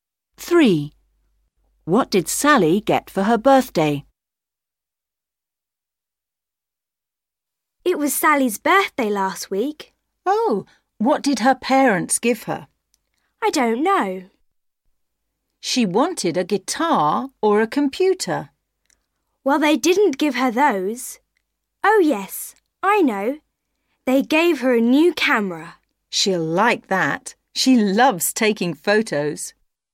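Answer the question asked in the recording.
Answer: A new camera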